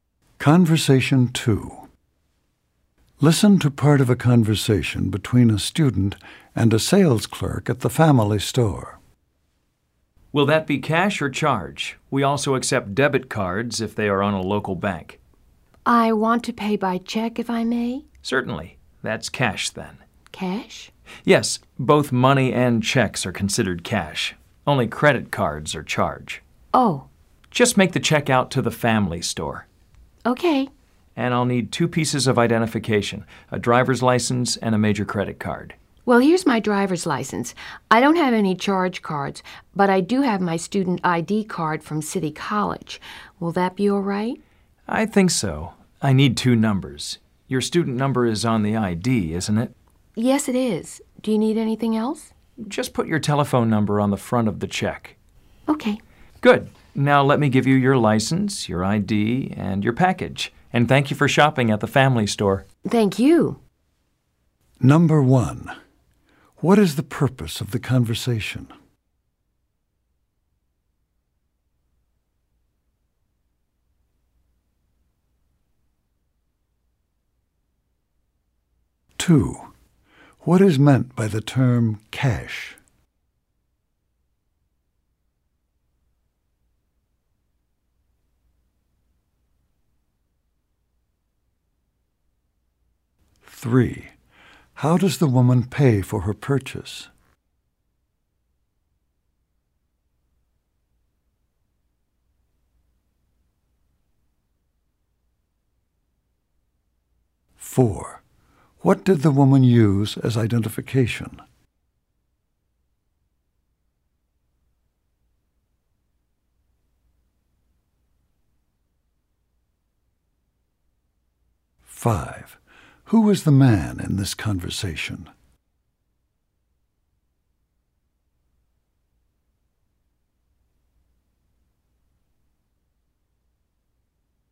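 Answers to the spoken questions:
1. To pay for a purchase
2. Both money and checks
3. By check
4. Her driver's license and student ID card
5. A sales clerk at the family store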